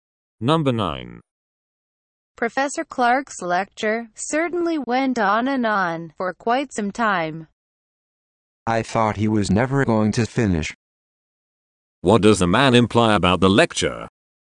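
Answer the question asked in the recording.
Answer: It was too long.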